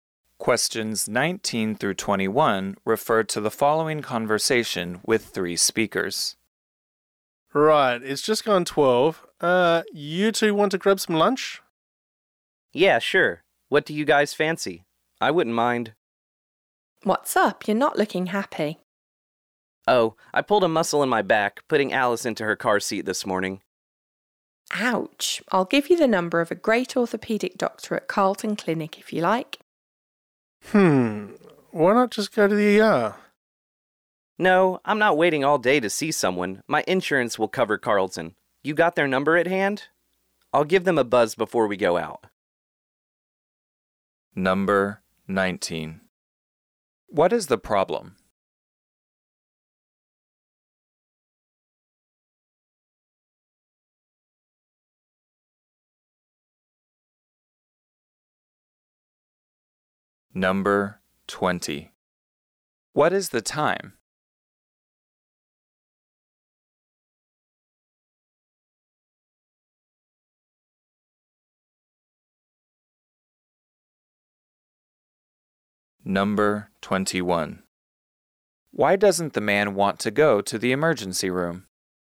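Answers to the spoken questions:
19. A man pulled a muscle in his back
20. Just after 12
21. He doesn't want to wait all day to see someone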